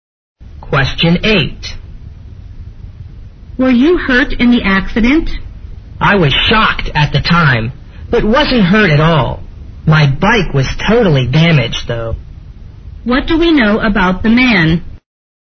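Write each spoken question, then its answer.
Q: What do we know about the man?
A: He wasn't hurt, but his bike was totally damaged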